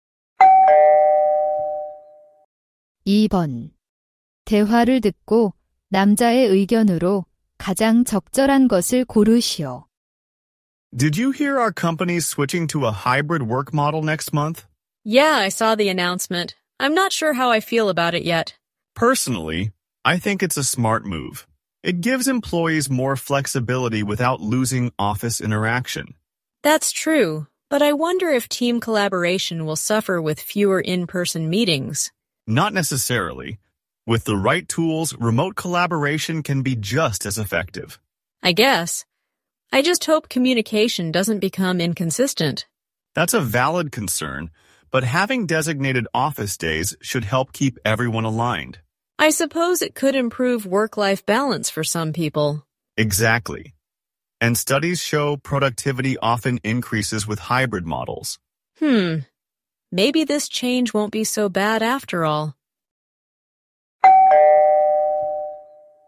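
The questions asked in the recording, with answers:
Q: 대화를 듣고 남자의 의견으로 가장 적절한 것을 고르시오.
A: 하이브리드 근무 방식 전환은 현명한 결정이다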